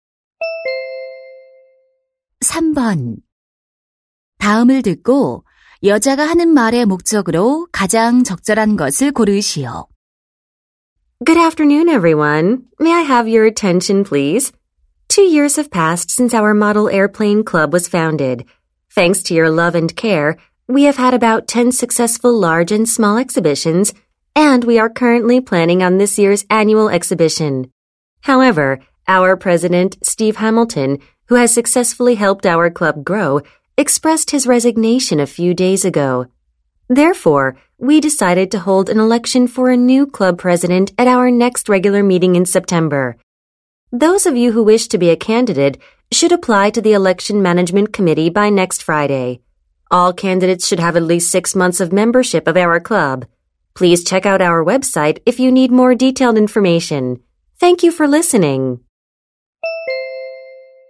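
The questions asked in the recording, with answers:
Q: 다음을 듣고 여자가 하는 말의 목적으로 가장 적절한 것을 고르시오.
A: 새 동아리 회장 선거 후보 신청을 안내하려고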